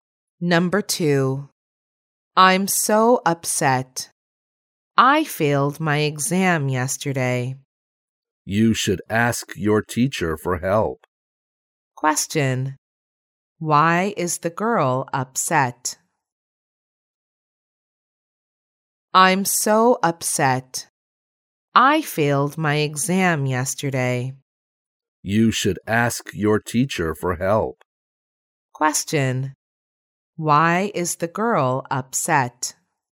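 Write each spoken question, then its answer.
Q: Why is the girl upset?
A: She failed her exam yesterday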